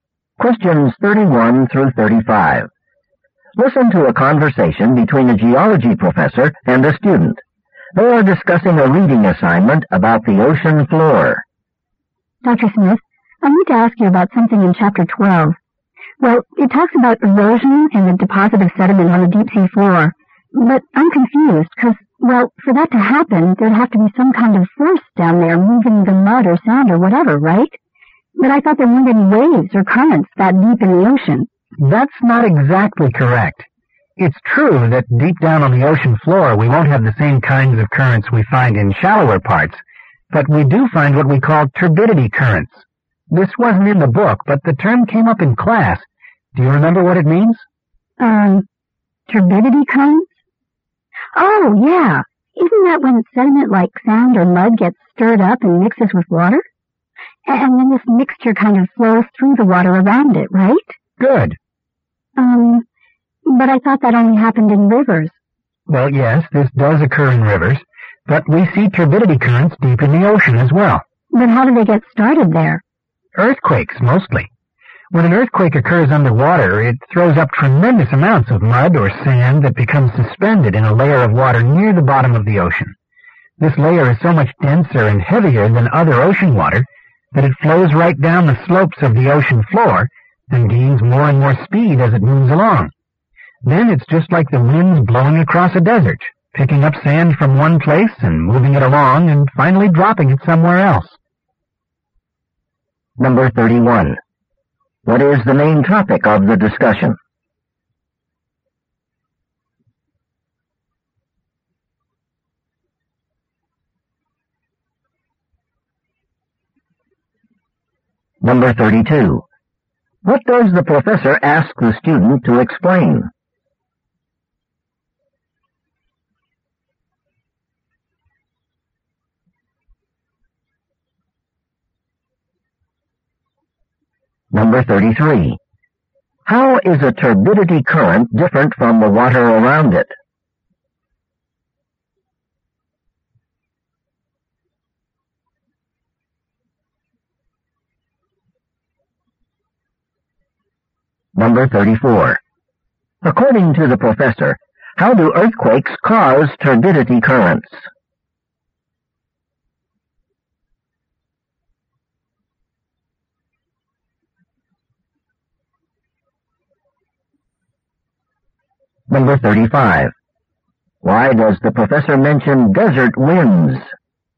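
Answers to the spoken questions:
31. Turbidity currents on the deep ocean floor
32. What turbidity currents are
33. It is denser and heavier
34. They throw up mud or sand that becomes suspended in the water
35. To compare how sediment is moved and deposited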